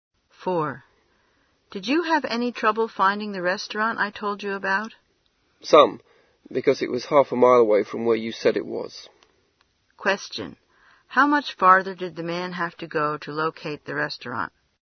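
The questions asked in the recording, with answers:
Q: How much farther did the man have to go to locate the restaurant?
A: Half a mile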